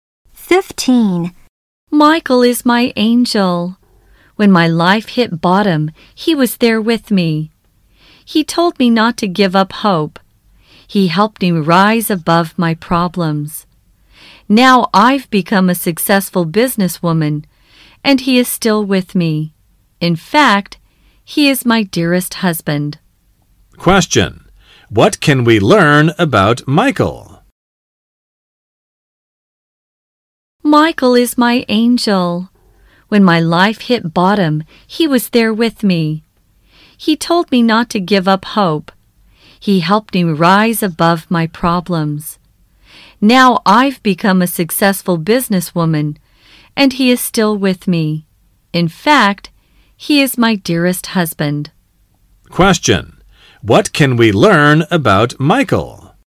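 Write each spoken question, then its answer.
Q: What can we learn about Michael?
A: He is the speaker's husband, who helped her when her life hit bottom.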